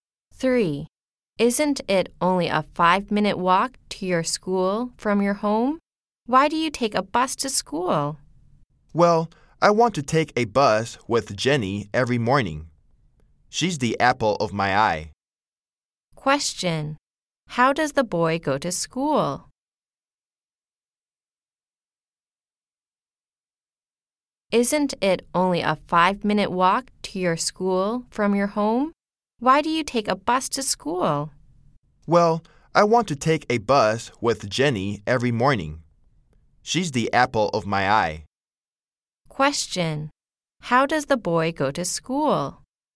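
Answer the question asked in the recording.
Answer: By bus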